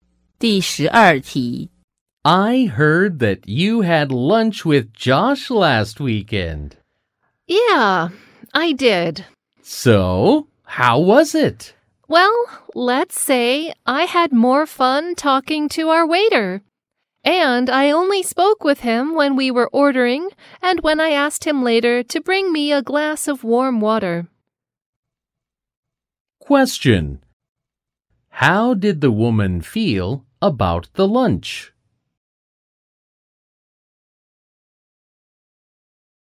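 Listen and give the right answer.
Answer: It was boring.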